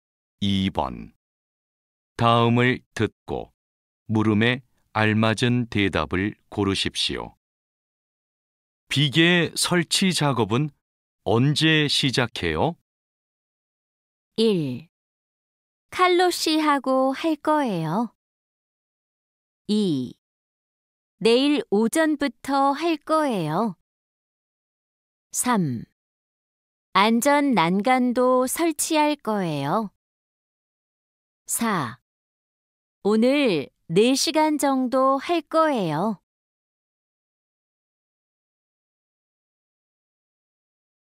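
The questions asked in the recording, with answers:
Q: 비계 설치 작업은 언제 시작해요?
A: 2: 내일 오전부터 할 거예요.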